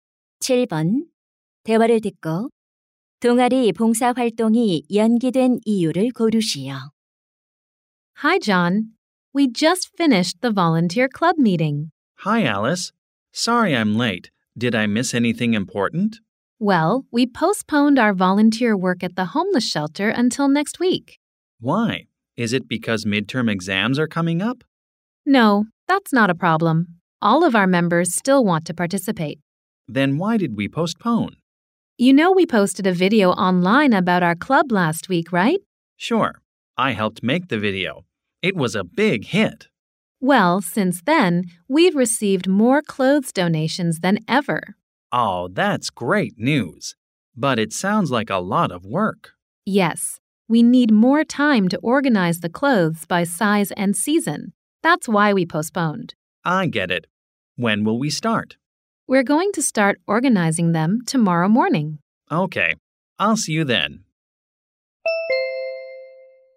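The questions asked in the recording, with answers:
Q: 대화를 듣고 동아리 봉사활동이 연기된 이유를 고르시오.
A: 기부받은 옷을 크기와 계절별로 정리할 시간이 더 필요해서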